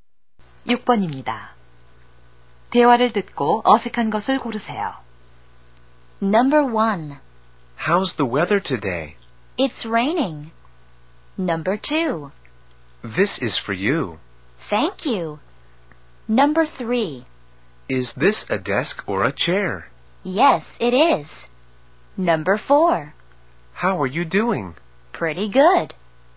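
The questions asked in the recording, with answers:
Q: 대화를 듣고 어색한 것을 고르세요.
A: 3: Is this a desk or a chair? / Yes, it is.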